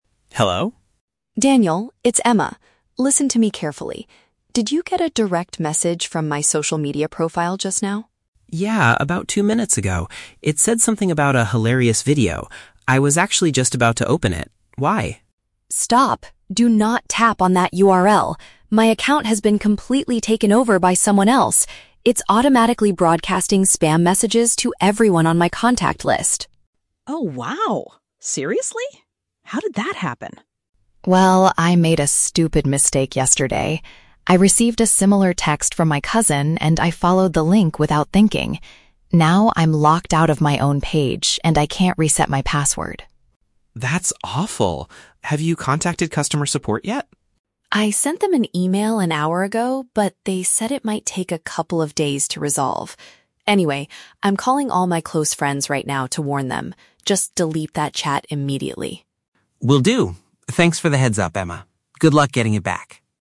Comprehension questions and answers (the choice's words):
Listen to a phone conversation between two friends. For each question, choose the correct answer (A, B, or C).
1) Why is Emma calling Daniel so urgently?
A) To share a very funny comedy video with him.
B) To tell him to avoid opening a dangerous web address.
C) To ask for his help in changing her security password.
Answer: To tell him to avoid opening a dangerous web address.

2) How did Emma lose control of her online profile?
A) She gave her login details to a family member.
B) She downloaded a fake video application.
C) She accessed a bad link sent by a relative.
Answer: She accessed a bad link sent by a relative.

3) What is Emma currently waiting for?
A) Assistance from the platform's help desk.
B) A reply email from her closest friends.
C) A warning message from the local police.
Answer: Assistance from the platform's help desk.

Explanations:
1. Emma calls to warn Daniel: "Do not tap on that URL" (which means avoid opening a dangerous web address). Option (A) is a trap; Daniel received a message about a "hilarious video," but it was a fake message sent by the hacker, not the reason Emma is calling. Option (C) is a trap; she mentions her password, but she does not ask Daniel to help her change it.
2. Emma says she "followed the link" that she received "from my cousin" (a relative). Option (A) is a trap; her cousin is mentioned, but she did not give her login details to them. Option (B) is plausible in a hacking situation but is never mentioned in the audio.
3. Emma says she contacted "customer support" (help desk) and is waiting because "it might take a couple of days to resolve." Option (B) is a trap; she mentions sending an "email" to support and calling her "close friends," but she is not waiting for an email from her friends. Option (C) is not mentioned.

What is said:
Daniel: Hello?
Emma: Daniel, it's Emma. Listen to me carefully. Did you get a direct message from my social media profile just now?
Daniel: Yeah, about two minutes ago. It said something about a hilarious video. I was actually just about to open it. Why?
Emma: Stop! Do not tap on that URL. My account has been completely taken over by someone else. It's automatically broadcasting spam messages to everyone on my contact list.
Daniel: Oh wow, seriously? How did that happen?
Emma: Well, I made a stupid mistake yesterday. I received a similar text from my cousin and I followed the link without thinking. Now I'm locked out of my own page and I can't reset my password.
Daniel: That's awful. Have you contacted customer support yet?
Emma: I sent them an email an hour ago, but they said it might take a couple of days to resolve. Anyway, I'm calling all my close friends right now to warn them. Just delete that chat immediately.